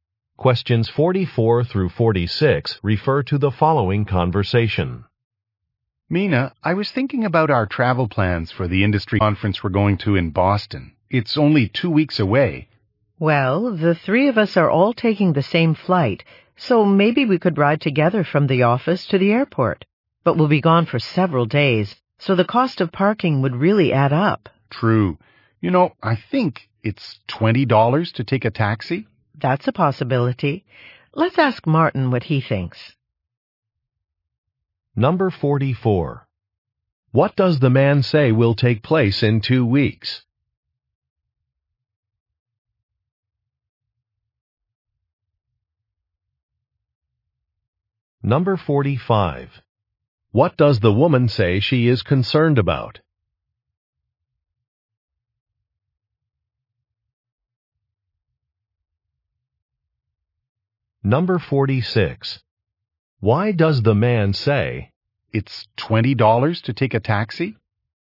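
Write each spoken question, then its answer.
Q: What does the man say will take place in 2 weeks?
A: An industry conference

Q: What does the woman say she is concerned about?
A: The cost of parking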